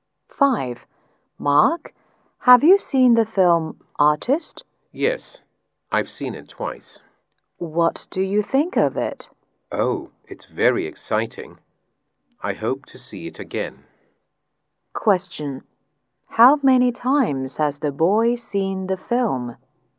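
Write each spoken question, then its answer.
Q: How many times has the boy seen the film?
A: Twice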